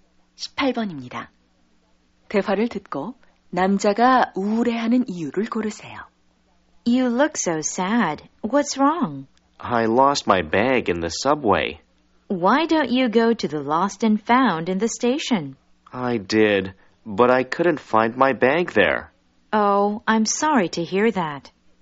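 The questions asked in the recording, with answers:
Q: 대화를 듣고 남자가 우울해하는 이유를 고르세요.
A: 지하철에서 가방을 잃어버려서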